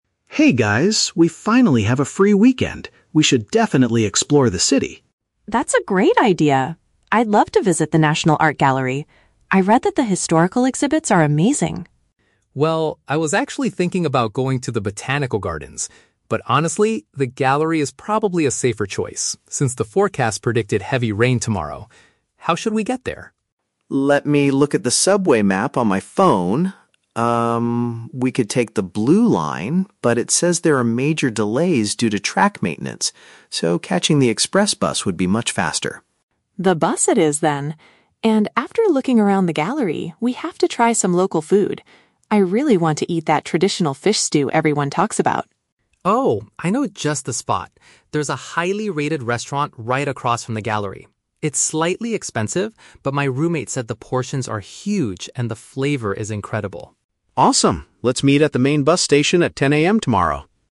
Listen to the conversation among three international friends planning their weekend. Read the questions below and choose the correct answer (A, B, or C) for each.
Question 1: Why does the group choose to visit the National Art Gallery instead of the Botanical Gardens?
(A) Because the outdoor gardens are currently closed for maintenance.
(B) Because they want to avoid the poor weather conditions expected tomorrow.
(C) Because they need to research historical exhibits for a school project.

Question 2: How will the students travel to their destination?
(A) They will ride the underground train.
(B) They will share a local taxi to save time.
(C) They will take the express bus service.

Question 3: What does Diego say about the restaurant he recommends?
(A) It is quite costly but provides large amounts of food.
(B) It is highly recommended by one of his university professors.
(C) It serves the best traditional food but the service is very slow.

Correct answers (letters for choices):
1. B
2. C
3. A

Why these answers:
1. The Key (Correct): Diego agrees to the gallery because "the forecast predicted heavy rain tomorrow." (Paraphrased: heavy rain = poor weather conditions). The Trap: Option (A) uses the word "maintenance", but in the audio, the maintenance is happening on the subway tracks, not at the gardens. Not mentioned: Option (C) mentions "historical exhibits" which Sakura wants to see, but doing a school project is never mentioned.
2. The Key (Correct): Liam suggests that "catching the express bus would be much faster," and Sakura agrees by saying "The bus it is, then." The Trap: Option (A) is incorrect. Liam looks at the subway (underground train) map initially, but they reject it because of "major delays." Not mentioned: Option (B) is a logical way to travel, bu

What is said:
Liam: Hey guys, we finally have a free weekend. We should definitely explore the city!
Sakura: That's a great idea. I'd love to visit the National Art Gallery. I read that the historical exhibits are amazing.
Diego: Well, I was actually thinking about going to the Botanical Gardens. But honestly, the gallery is probably a safer choice since the forecast predicted heavy rain tomorrow. How should we get there?
Liam: Let me look at the subway map on my phone. Um, we could take the Blue Line, but it says there are major delays due to track maintenance. So, catching the express bus would be much faster.
Sakura: The bus it is, then. And after looking around the gallery, we have to try some local food. I really want to eat that traditional fish stew everyone talks about.
Diego: Oh, I know just the spot! There's a highly-rated restaurant right across from the gallery. It's slightly expensive, but my roommate said the portions are huge and the flavor is incredible.